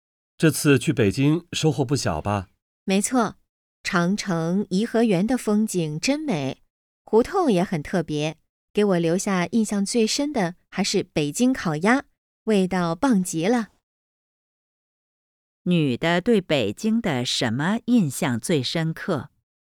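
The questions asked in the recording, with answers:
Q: 女的对北京的什么印象最深刻?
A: 北京烤鸭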